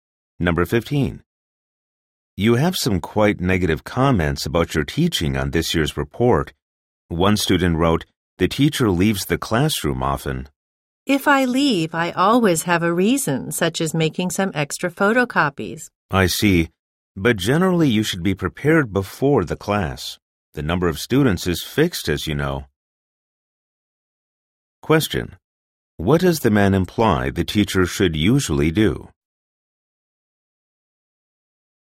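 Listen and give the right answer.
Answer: Be prepared before class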